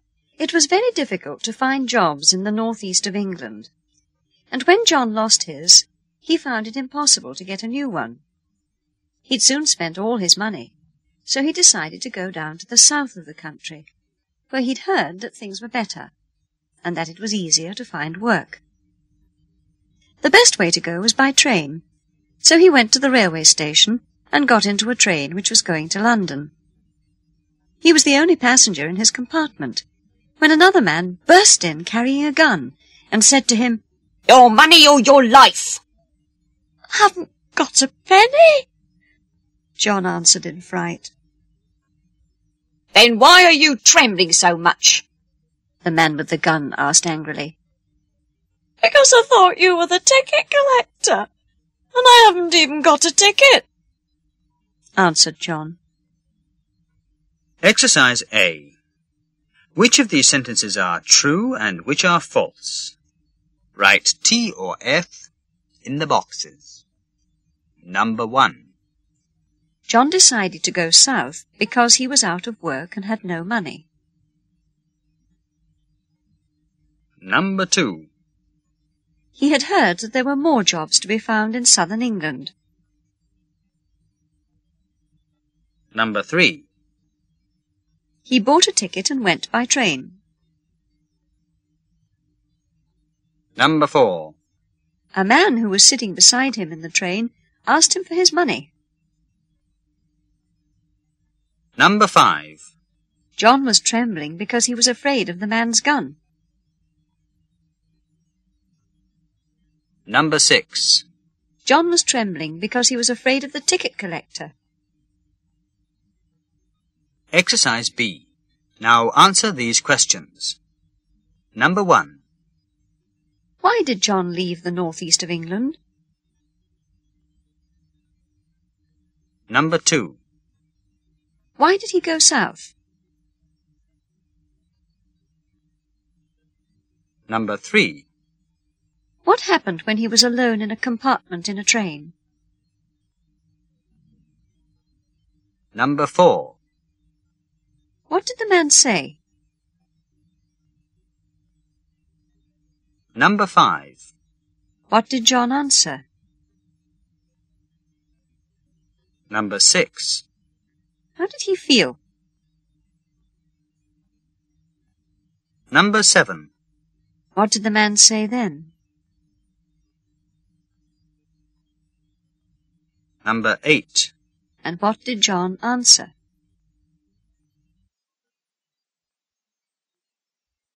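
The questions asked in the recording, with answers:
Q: John decided to go south because he was out of work and had no money.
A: True

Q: He had heard that there were more jobs to be found in southern England.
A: True

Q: He bought a ticket and went by train.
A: False

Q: A man who was sitting beside him in the train asked him for his money.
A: False

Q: John was trembling because he was afraid of the man's gun.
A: False

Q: John was trembling because he was afraid of the ticket collector.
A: True

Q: Why did John leave the northeast of England?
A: He lost his job, couldn't find a new one and had spent all his money.

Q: Why did he go south?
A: He'd heard it was easier to find work there.

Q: What happened when he was alone in a compartment in a train?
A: A man burst in carrying a gun.

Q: What did the man say?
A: "Your money or your life!"

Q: What did John answer?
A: "I haven't got a penny."

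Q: How did he feel?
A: Frightened.

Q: What did the man say then?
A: "Then why are you trembling so much?"

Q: And what did John answer?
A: "Because I thought you were the ticket collector, and I haven't even got a ticket."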